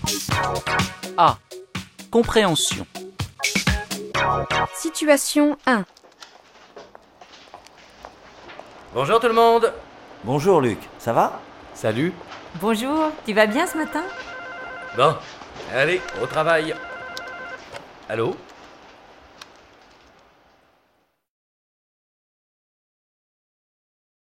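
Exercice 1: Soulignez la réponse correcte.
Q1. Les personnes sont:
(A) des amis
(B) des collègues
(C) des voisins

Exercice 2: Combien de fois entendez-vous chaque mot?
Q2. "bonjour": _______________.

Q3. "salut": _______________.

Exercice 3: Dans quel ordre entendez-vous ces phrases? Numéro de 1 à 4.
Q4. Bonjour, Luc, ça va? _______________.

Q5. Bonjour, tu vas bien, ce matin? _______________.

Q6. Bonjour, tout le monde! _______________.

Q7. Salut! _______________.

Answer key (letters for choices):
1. B
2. 3
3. 1
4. 2
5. 4
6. 1
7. 3

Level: Bài tập tiếng Pháp A1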